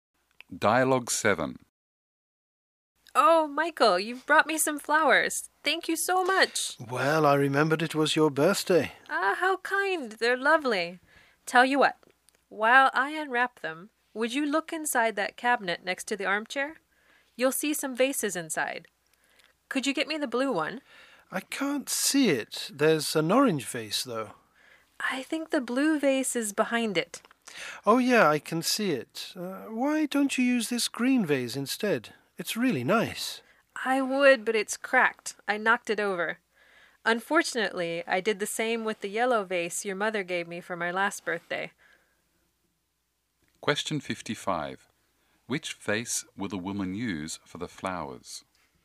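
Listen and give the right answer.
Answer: The blue vase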